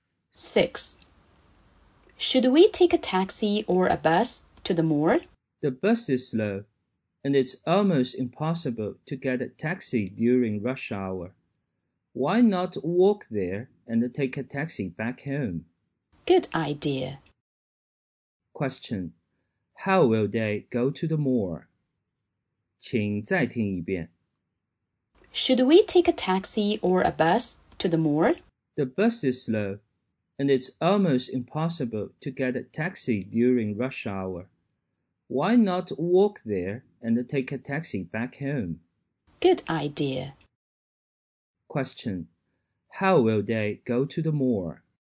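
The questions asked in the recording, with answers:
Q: How will they go to the moor?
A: They will walk there and take a taxi back home.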